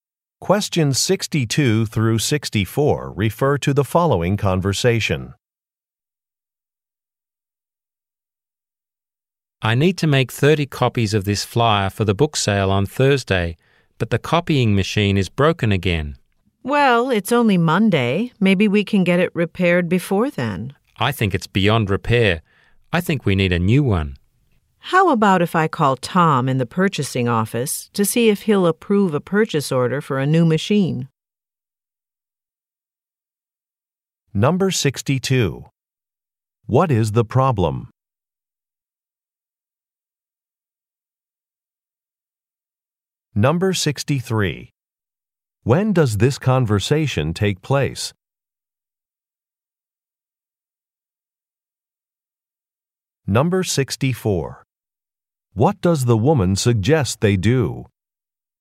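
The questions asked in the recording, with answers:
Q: What is the problem?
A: The copying machine is broken

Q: When does this conversation take place?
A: On Monday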